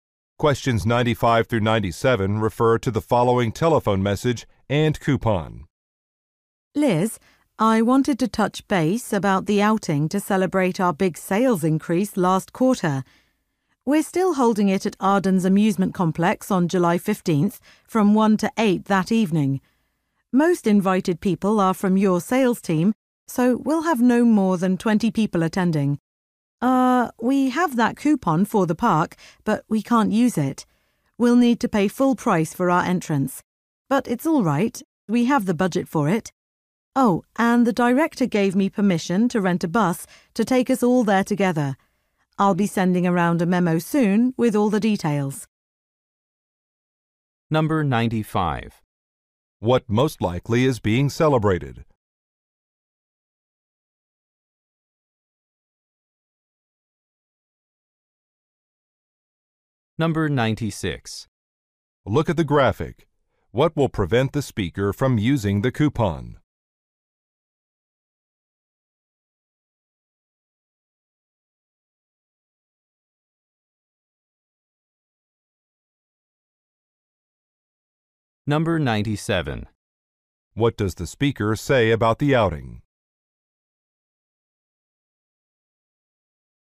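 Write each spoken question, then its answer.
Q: What most likely is being celebrated?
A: An increase in sales

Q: What does the speaker say about the outing?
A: A bus will be rented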